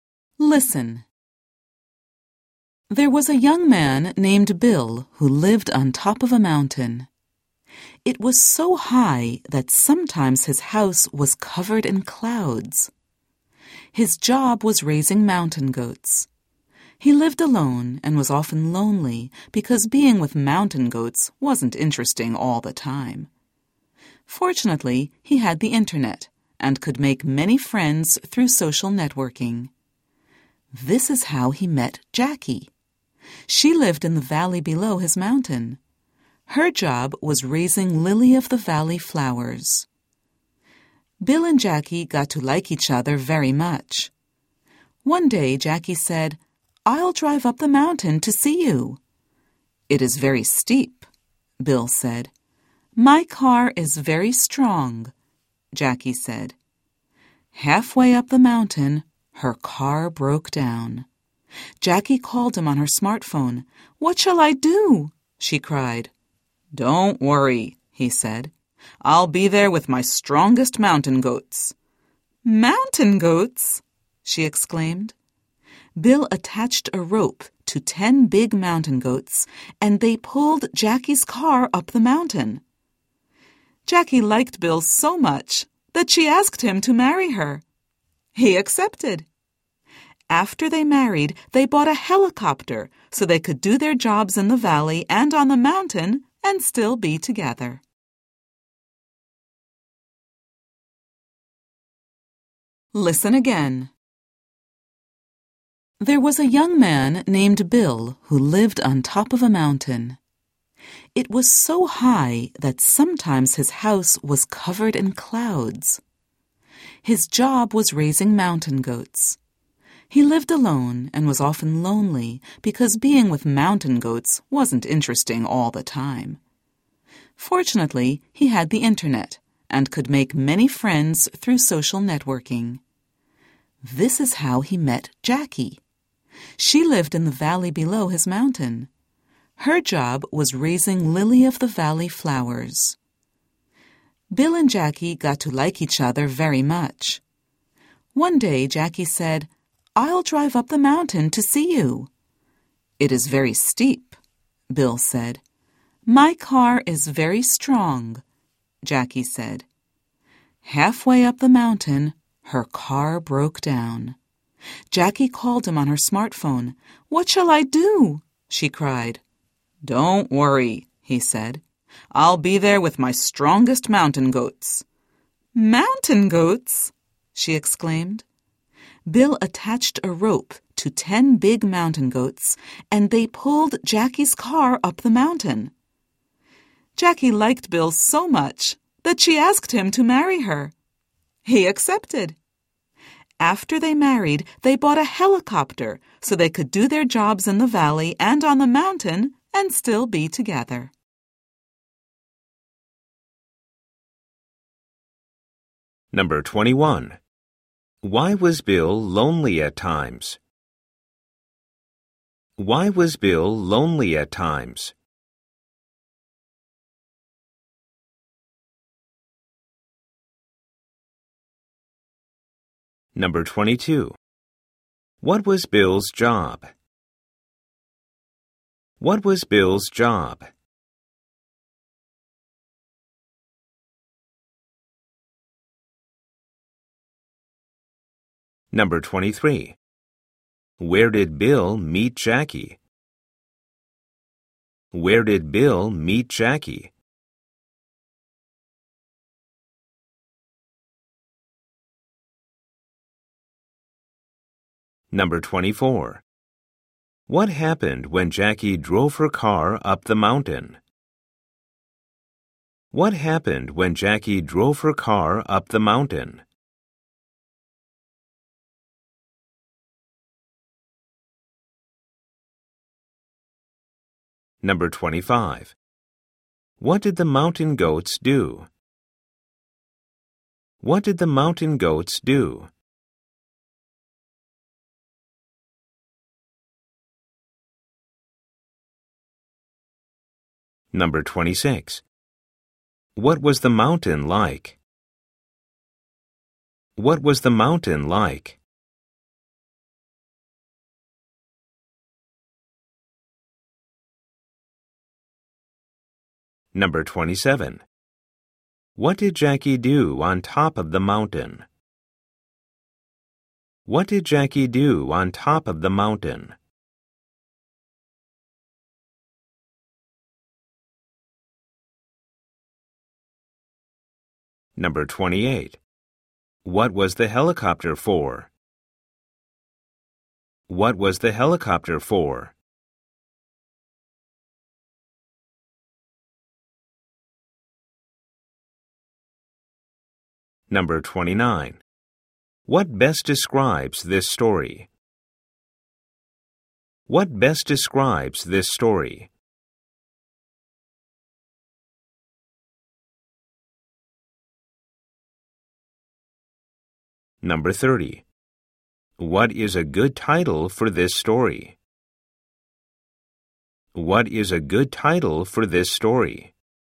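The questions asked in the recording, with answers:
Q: Why was Bill lonely at times?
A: He lived alone, and being with mountain goats wasn't always interesting

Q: What was Bill's job?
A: Raising mountain goats

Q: Where did Bill meet Jackie?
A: On the internet, through social networking

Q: What happened when Jackie drove her car up the mountain?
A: Her car broke down halfway up

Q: What did the mountain goats do?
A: They pulled Jackie's car up the mountain

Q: What was the mountain like?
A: Very high and steep, sometimes covered in clouds

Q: What did Jackie do on top of the mountain?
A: She asked Bill to marry her

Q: What was the helicopter for?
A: So they could do their jobs in the valley and on the mountain and still be together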